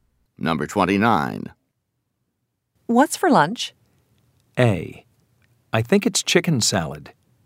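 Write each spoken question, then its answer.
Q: What's for lunch?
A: A: I think it's chicken salad.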